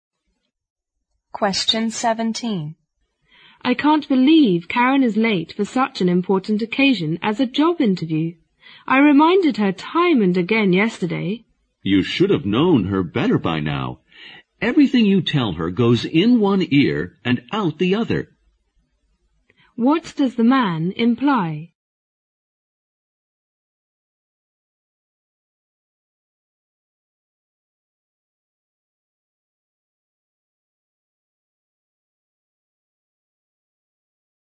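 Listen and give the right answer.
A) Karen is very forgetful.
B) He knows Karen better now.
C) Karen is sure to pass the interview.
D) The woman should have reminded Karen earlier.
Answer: A) Karen is very forgetful.

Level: 六级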